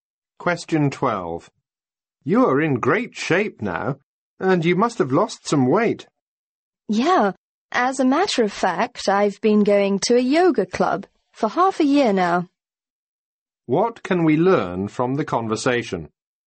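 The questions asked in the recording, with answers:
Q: What can we learn from the conversation?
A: The man has been going to a yoga club and is in great shape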